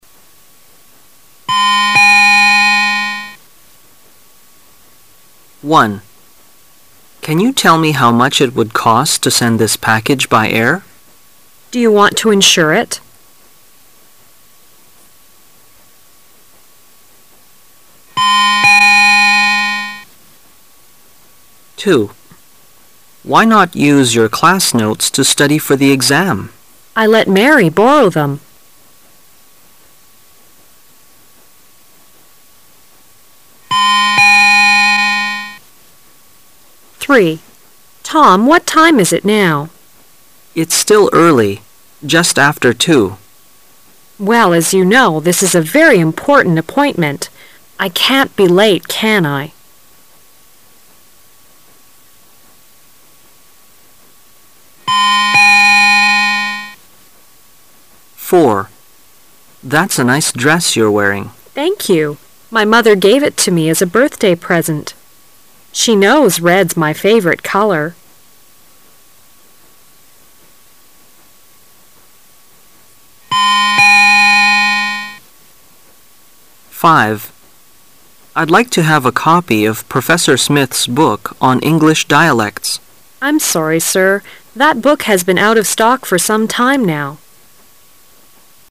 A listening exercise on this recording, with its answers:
Part A You will hear 10 short dialogues. For each dialogue, there is one question and four possible answers. Choose the correct answer- A, B, C or D, and mark it in your test booklet. You will have 15 seconds to answer the question and you will hear each dialogue ONLY ONCE.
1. Where is this conversation probably taking place?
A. In a post office.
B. At an insurance agency.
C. On an airplane.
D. In a moving company.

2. What does the man mean?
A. He lent his notes to a classmate.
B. He forgot to borrow the notes.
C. He doesn't have an exam.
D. He left his notes in class.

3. Why does the woman ask about the time?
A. She does not have a watch.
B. She is nervous about the appointment.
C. Tom's watch keeps good time.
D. Tom is afraid to be late.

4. What are they talking about?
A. Their best friend.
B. Their favourite colour.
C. The clothes the woman is wearing.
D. A present the man has bought.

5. Where did the conversation most probably take place?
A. In a library.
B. In a classroom.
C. In a bookstore.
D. In a hotel.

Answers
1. A. In a post office.
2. A. He lent his notes to a classmate.
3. B. She is nervous about the appointment.
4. C. The clothes the woman is wearing.
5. C. In a bookstore.

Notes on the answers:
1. M: Can you tell me how much it would cost to send this package by air? W: Do you want to insure it?
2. M: Why not use your class notes to study for the exam? W: I let Mary borrow them.
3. W: Tom, what time is it now? M: It's still early, just after two. W: Well, as you know, this is a very important appointment. I can't be late, can I?

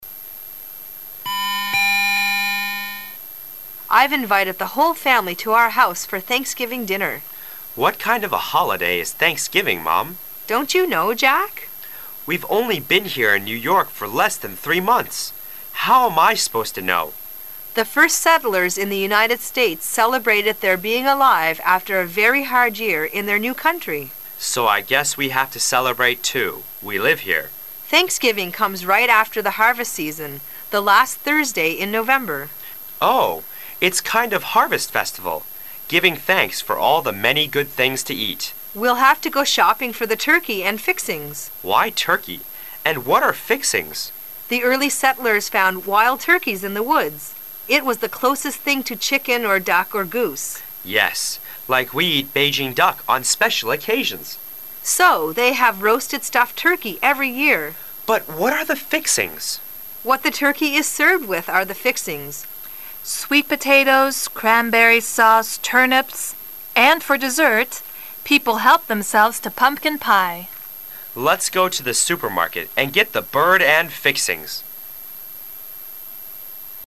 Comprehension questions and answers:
Questions 11~13 are based on the following dialogue.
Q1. What can we learn about Jack from the dialogue?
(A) He's a native in America.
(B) He's a new comer to America.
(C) He knows very well about the holiday.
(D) He dislikes this kind of holiday.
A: (B) He's a new comer to America.

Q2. What do people eat on Thanksgiving Day?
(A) Turkey.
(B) Chicken.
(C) Duck.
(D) Goose.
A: (A) Turkey.

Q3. What will the two speakers do immediately after the talk?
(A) They will prepare dinner.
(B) They will go shopping for gifts to their guests.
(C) They will invite some people to dinner.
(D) They will go shopping for turkey and fixings.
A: (D) They will go shopping for turkey and fixings.

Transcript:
[解析] 11-13 W: I've invited the whole family to our house for Thanksgiving dinner. M: What kind of a holiday is Thanksgiving, Mom? W: Don't you know, Jack? M: We've only been here in New York for less than three months! How am I supposed to know? W: The first settlers in the United States celebrated their being alive after a very hard year in their new country. M: So, I guess, we have to celebrate, too. We live here. W: Thanksgiving comes right after the harvest season, the last Thursday in November. M: Oh, it's kind of harvest festival, giving thanks for all the many good things to eat. W: We'll have to go shopping for the turkey and fixings. M: Why turkey? And what are fixings? W: The early settlers found wild turkeys in the woods. It was the closest thing to chicken or duck or goose. M: Yes, like we eat Beijing Duck on special occasions. W: So they have roasted stuffed turkey every year. M: But what are the fixings? W: What the turkey is served with are the fixings.., sweet potatoes, cranberry sauce, turnips, and for dessert, people help themselves to pumpkin pie. M: Let's go to the supermarket and get the bird and fixings!

